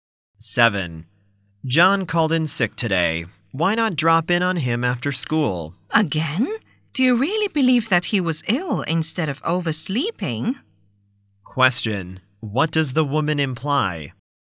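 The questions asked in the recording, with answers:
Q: What does the woman imply?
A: She doubts John was really ill; he probably overslept.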